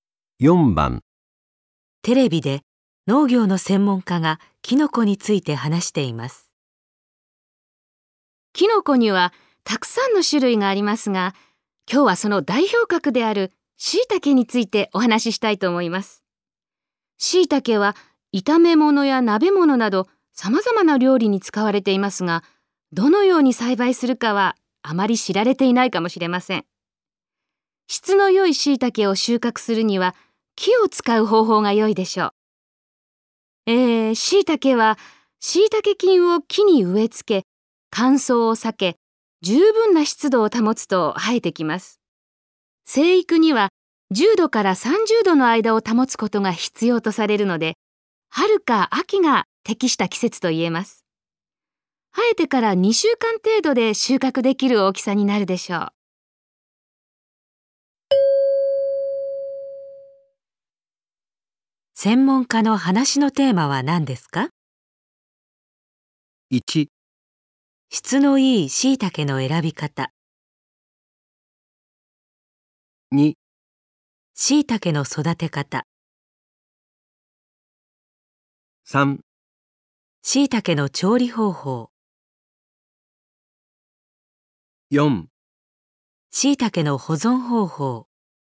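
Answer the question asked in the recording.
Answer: 2: 椎茸の育て方。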